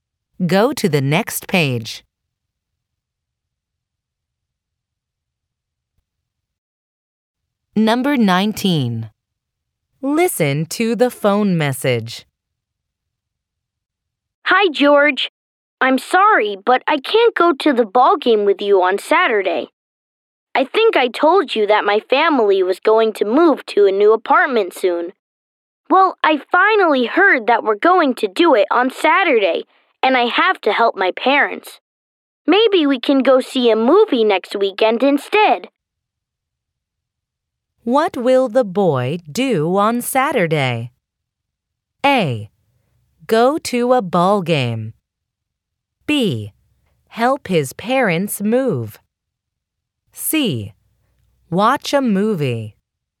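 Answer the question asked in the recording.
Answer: B: Help his parents move.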